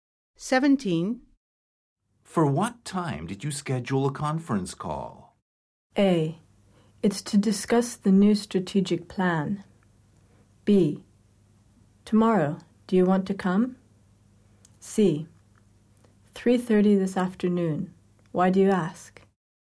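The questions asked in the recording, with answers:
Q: For what time did you schedule a conference call?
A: C: 3:30 this afternoon. Why do you ask?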